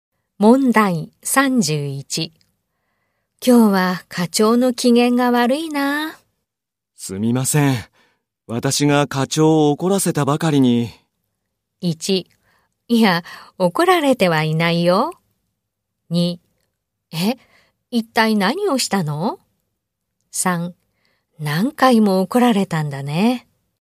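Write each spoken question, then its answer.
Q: 今日は課長の機嫌が悪いな。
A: 2: え、一体何をしたの?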